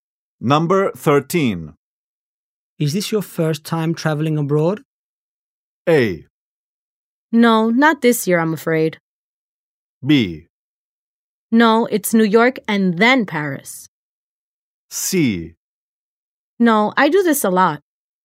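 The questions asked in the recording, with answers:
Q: Is this your first time traveling abroad?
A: C: No, I do this a lot.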